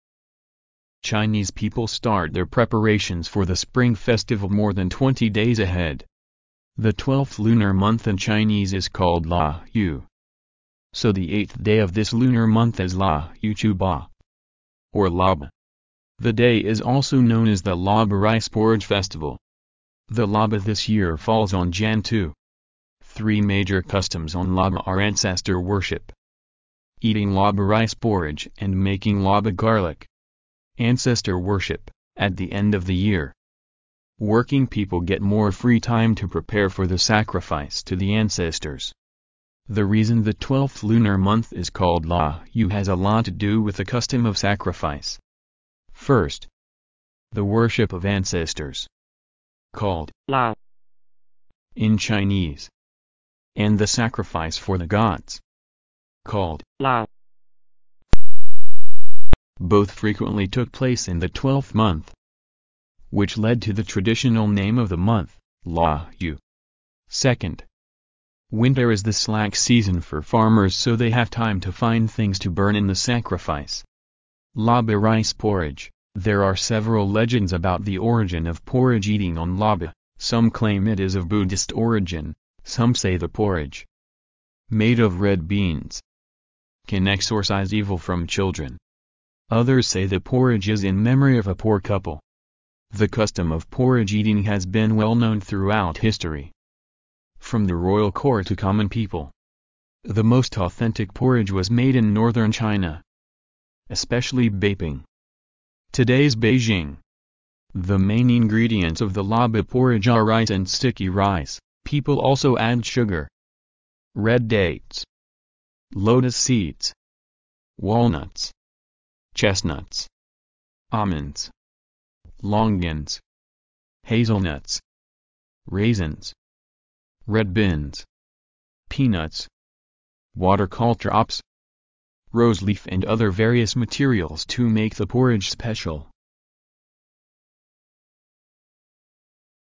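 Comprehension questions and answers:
Listen to the passage. For questions 21—25, fill in the blanks with the exact words or phrases you hear.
The Laba this year 1 Jan 2.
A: falls on

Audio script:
Chinese people start their preparations for the Spring Festival more than 20 days ahead. The 12th lunar month in Chinese is called la yue, so the eighth day of this lunar month is la yue chu ba, or laba. The day is also known as the Laba Rice Porridge Festival. Three major customs on Laba are ancestor worship, eating Laba rice porridge and making Laba garlic.
Ancestor worship: At the end of the year, working people get more free time to 2 the sacrifice to the ancestors. The reason the 12th lunar month is called la yue has a lot to do with the custom of sacrifice. First, the worship of ancestors, called ̈腊" in Chinese, and the sacrifice for the gods, called "蜡", both frequently took place in the 12th month, which 3 the traditional name of the month: la yue.
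First, the worship of ancestors, called ̈腊" in Chinese, and the sacrifice for the gods, called "腊", both frequently took place in the 12th month, which led to the traditional name of the month: la yue. Second, winter is the slack season for farmers so they have time to find things to burn in the sacrifice. Laba rice porridge: There are several legends about the origin of porridge eating on Laba: Some claim it is of Buddhist origin; some say the porridge, made of red beans, can exorcize evil from children. Others say the porridge is in memory of a poor couple. The custom of porridge eating has been well known throughout history, from the royal court to common people. The most "authentic" porridge was made in northern China, especially Beiping, today's Beijing. The main ingredients of the Laba porridge are rice and sticky rice; people also add sugar, red dates, lotus seeds, walnuts, chestnuts, almonds, longans, hazelnuts, raisins, red beans, peanuts, water caltrops, roseleaf and other various materials to make the porridge special.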